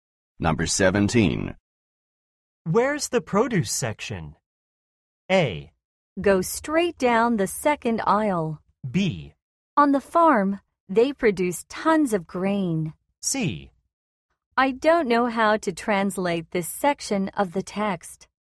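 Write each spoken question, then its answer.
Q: Where's the produce section?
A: A: Go straight down the second aisle.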